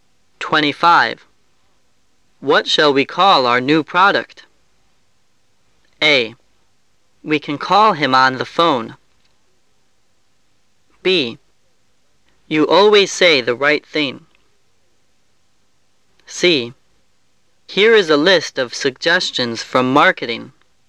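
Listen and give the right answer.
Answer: C: Here is a list of suggestions from marketing.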